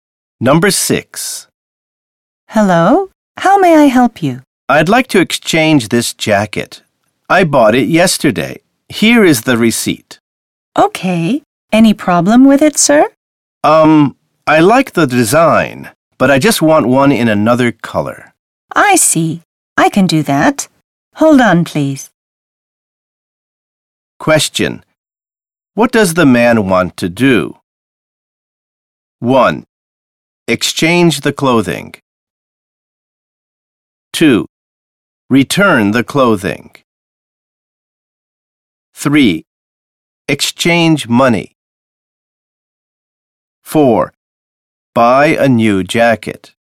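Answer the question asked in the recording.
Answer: 1: Exchange the clothing.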